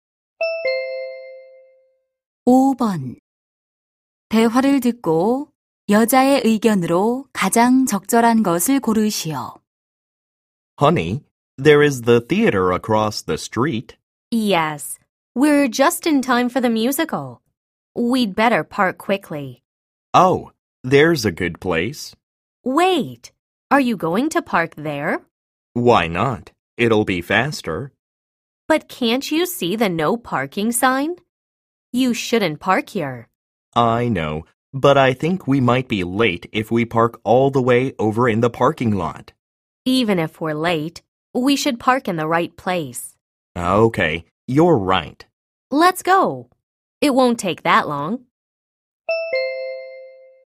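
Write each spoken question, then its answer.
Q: 대화를 듣고 여자의 의견으로 가장 적절한 것을 고르시오.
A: 늦더라도 정해진 곳에 주차해야 한다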